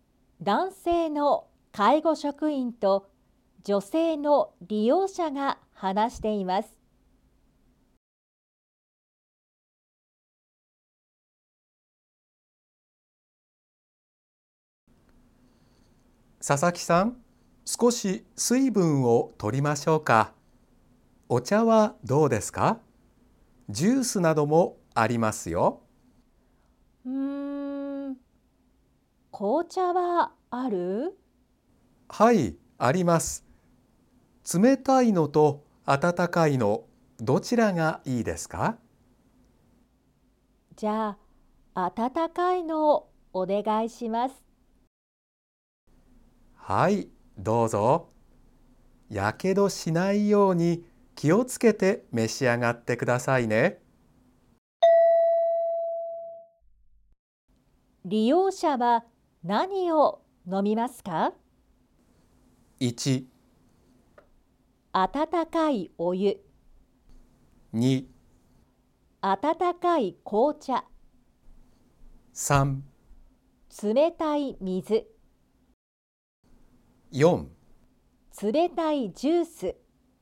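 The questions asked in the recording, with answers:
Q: 利用者は何を飲みますか?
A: 2: 温かい紅茶。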